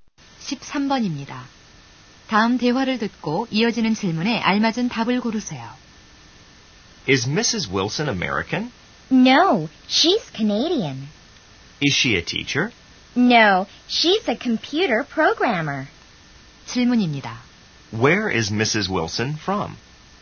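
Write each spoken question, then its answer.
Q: Where is Mrs. Wilson from?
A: Canada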